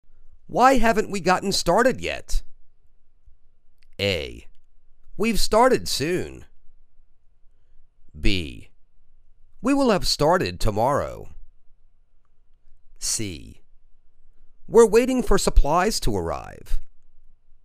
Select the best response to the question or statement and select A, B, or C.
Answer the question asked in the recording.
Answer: We're waiting for supplies to arrive.